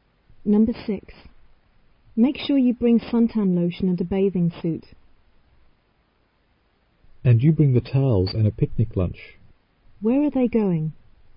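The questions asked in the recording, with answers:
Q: Where are they going?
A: To the beach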